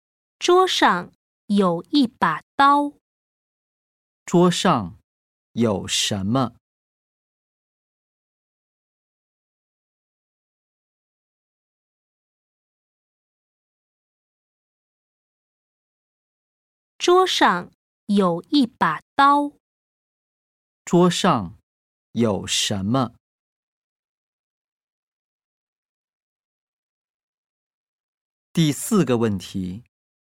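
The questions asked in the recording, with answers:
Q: 桌上有什么?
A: 一把刀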